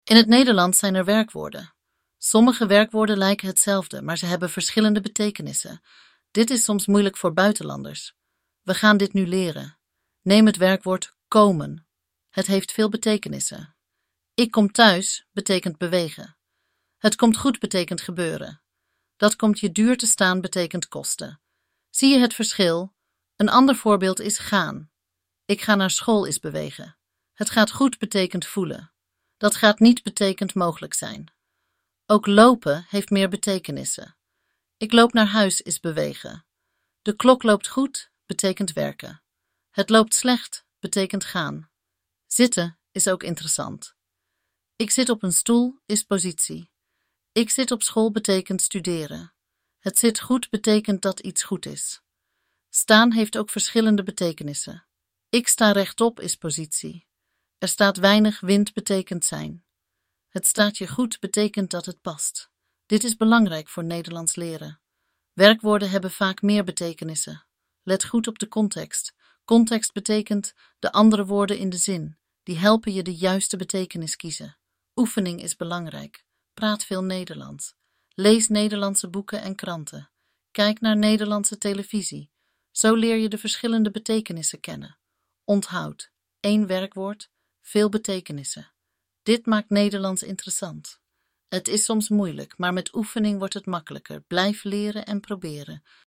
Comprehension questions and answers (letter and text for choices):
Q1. Wat betekent "komen" in "Ik kom thuis"?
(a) Gebeuren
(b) Kosten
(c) Bewegen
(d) Voelen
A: (c) Bewegen

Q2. Welk werkwoord betekent "passen" in "Het staat je goed"?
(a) Komen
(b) Gaan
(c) Lopen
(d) Staan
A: (d) Staan

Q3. Wat is de betekenis van "zitten" in "Ik zit op school"?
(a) Positie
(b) Studeren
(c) Passen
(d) Werken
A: (b) Studeren

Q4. Welk werkwoord betekent "werken" in de tekst?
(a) Gaan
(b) Lopen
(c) Zitten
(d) Staan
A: (b) Lopen

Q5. Wat helpt bij het kiezen van de juiste betekenis?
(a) De context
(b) Het weer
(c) De kleur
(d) De tijd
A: (a) De context

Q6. Wat betekent "gaan" in "Dat gaat niet"?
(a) Bewegen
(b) Voelen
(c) Mogelijk zijn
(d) Kosten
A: (c) Mogelijk zijn

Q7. Hoe kun je verschillende betekenissen leren volgens de tekst?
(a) Door te slapen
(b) Door te oefenen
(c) Door te eten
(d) Door te zwemmen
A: (b) Door te oefenen

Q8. Wat maakt Nederlands interessant volgens de tekst?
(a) Moeilijke woorden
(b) Lange zinnen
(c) Verschillende betekenissen van werkwoorden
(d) Veel uitzonderingen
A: (c) Verschillende betekenissen van werkwoorden

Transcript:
In het Nederlands zijn er werkwoorden. Sommige werkwoorden lijken hetzelfde. Maar ze hebben verschillende betekenissen. Dit is soms moeilijk voor buitenlanders. We gaan dit nu leren.
Neem het werkwoord "komen". Het heeft veel betekenissen. "Ik kom thuis" betekent bewegen. "Het komt goed" betekent gebeuren. "Dat komt je duur te staan" betekent kosten. Zie je het verschil?
Een ander voorbeeld is "gaan". "Ik ga naar school" is bewegen. "Het gaat goed" betekent voelen. "Dat gaat niet" betekent mogelijk zijn.
Ook "lopen" heeft meer betekenissen. "Ik loop naar huis" is bewegen. "De klok loopt goed" betekent werken. "Het loopt slecht" betekent gaan.
"Zitten" is ook interessant. "Ik zit op een stoel" is positie. "Ik zit op school" betekent studeren. "Het zit goed" betekent dat iets goed is.
"Staan" heeft ook verschillende betekenissen. "Ik sta rechtop" is positie. "Er staat weinig wind" betekent zijn. "Het staat je goed" betekent dat het past.
Dit is belangrijk voor Nederlands leren. Werkwoorden hebben vaak meer betekenissen. Let goed op de context. Context betekent: de andere woorden in de zin. Die helpen je de juiste betekenis kiezen.
Oefening is belangrijk. Praat veel Nederlands. Lees Nederlandse boeken en kranten. Kijk naar Nederlandse televisie. Zo leer je de verschillende betekenissen kennen.
Onthoud: één werkwoord, veel betekenissen. Dit maakt Nederlands interessant. Maar met oefening wordt het makkelijker. Blijf leren en proberen!

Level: A1-A2